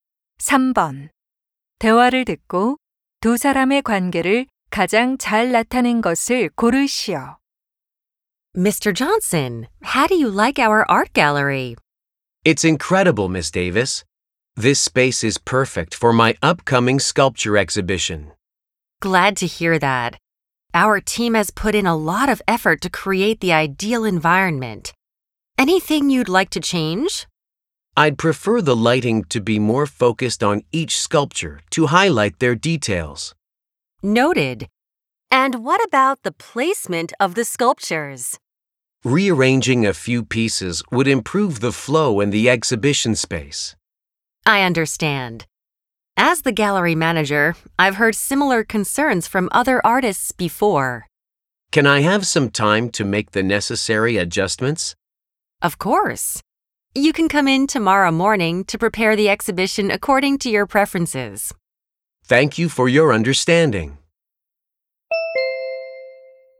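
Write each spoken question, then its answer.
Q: 대화를 듣고 두 사람의 관계를 가장 잘 나타낸 것을 고르시오.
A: 조각가 - 미술관 관리자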